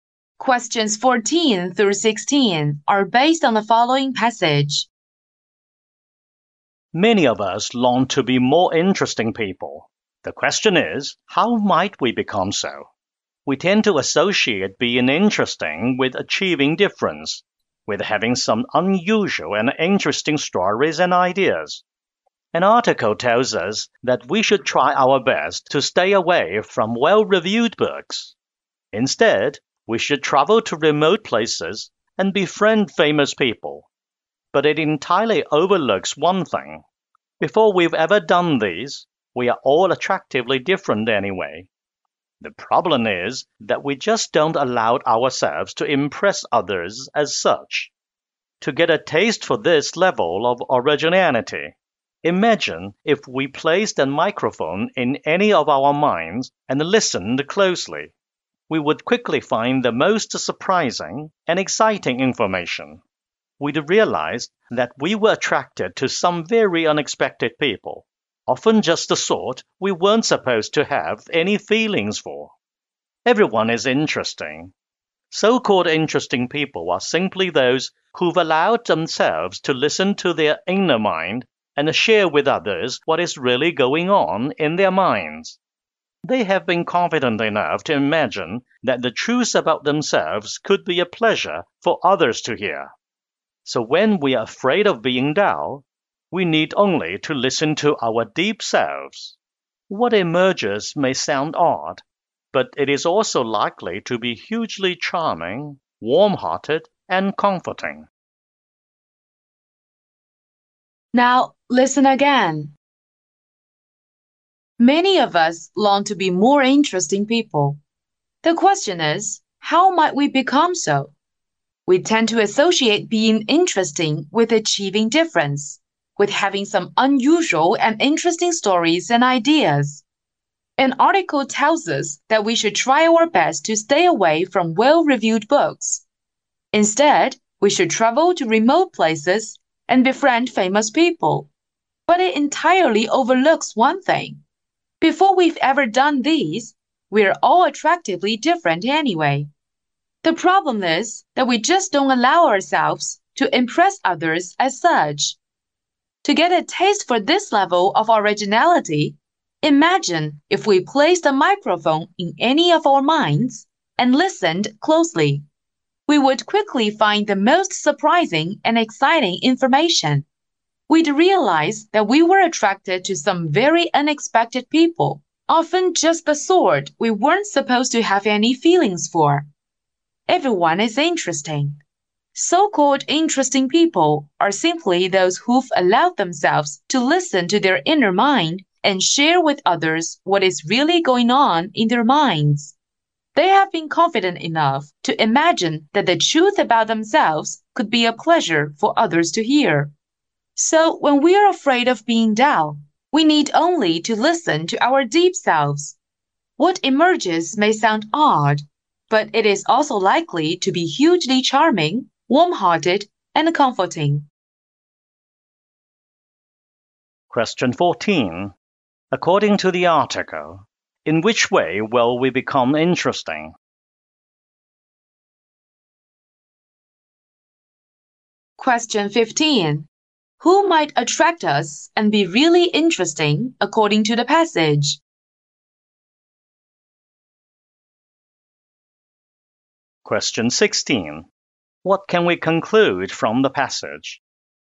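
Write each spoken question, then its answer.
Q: According to the article, in which way will we become interesting?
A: By listening to our inner mind and sharing it with others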